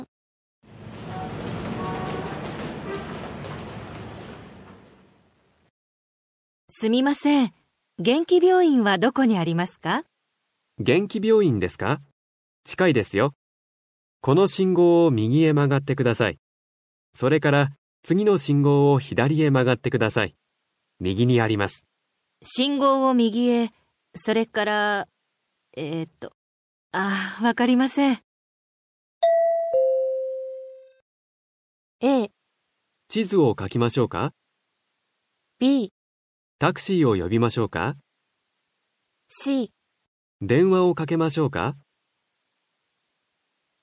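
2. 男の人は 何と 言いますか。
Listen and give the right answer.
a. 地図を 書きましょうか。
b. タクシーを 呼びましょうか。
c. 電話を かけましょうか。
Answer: a. 地図を 書きましょうか。

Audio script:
A: すみません、 げんき病院は どこに ありますか。
B: げんき病院ですか。 近いですよ。
この 信号を 右へ 曲がってください。
それから、 次の 信号を 左へ 曲がってください。
A: 信号を 右へ... それから...えーと、 ああ、 わかりません。
B: a. 地図を 書きましょうか。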